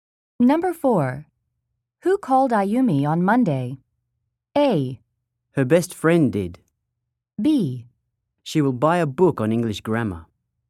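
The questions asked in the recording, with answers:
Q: Who called Ayumi on Monday?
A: A: Her best friend did.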